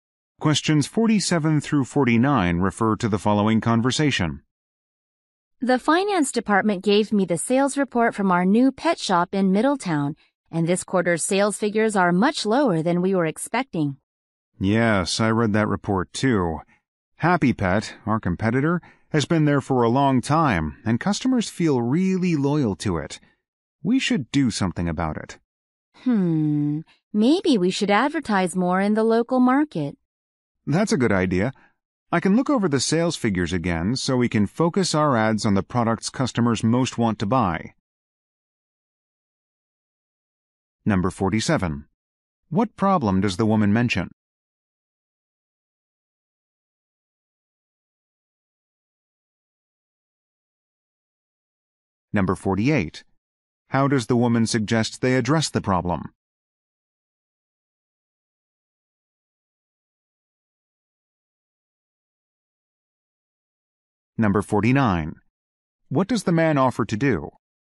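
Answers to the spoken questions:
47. Sales at the new pet shop are lower than expected
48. Advertise more in the local market
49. Look over the sales figures again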